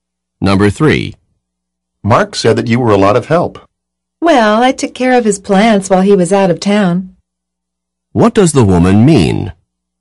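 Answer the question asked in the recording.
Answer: She took care of Mark's plants while he was away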